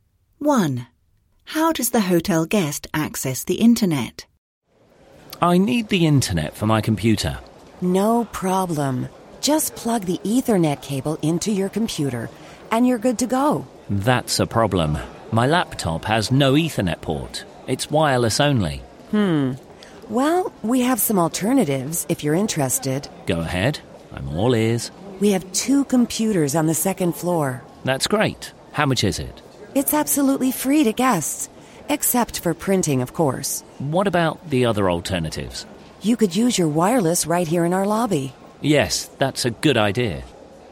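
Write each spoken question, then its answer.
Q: How does the hotel guest access the internet?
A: He uses wireless internet in the hotel lobby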